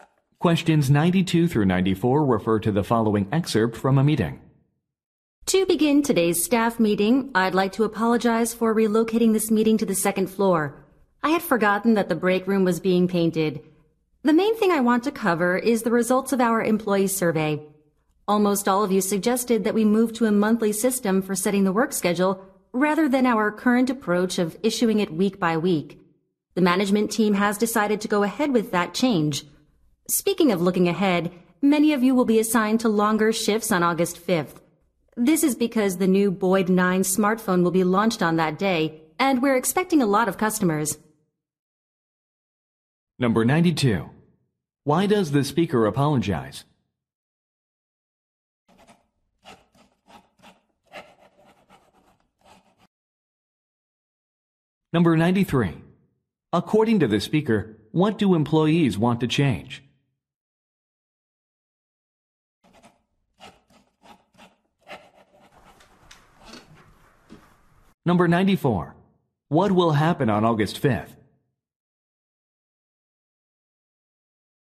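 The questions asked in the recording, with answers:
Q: Why does the speaker apologize?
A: The meeting was moved to a different room

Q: According to the speaker, what do employees want to change?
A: Make the work schedule monthly instead of weekly

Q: What will happen on August 5th?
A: A new smartphone will be launched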